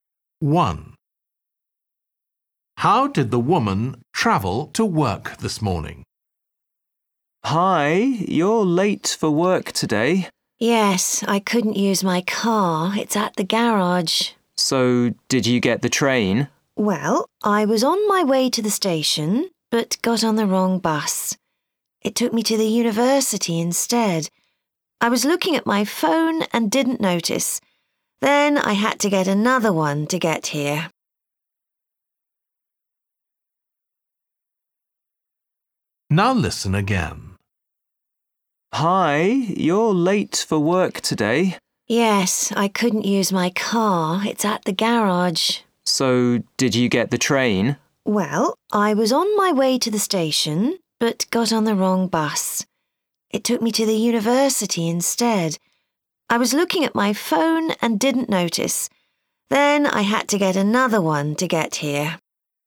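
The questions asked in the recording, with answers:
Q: How did the woman travel to work this morning?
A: By bus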